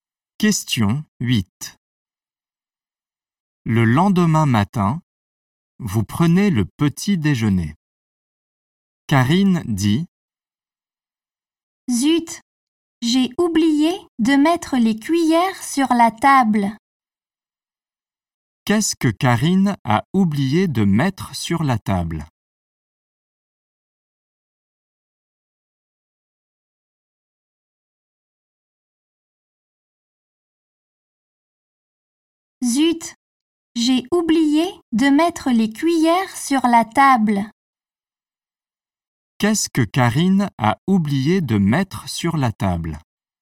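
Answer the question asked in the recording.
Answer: Les cuillères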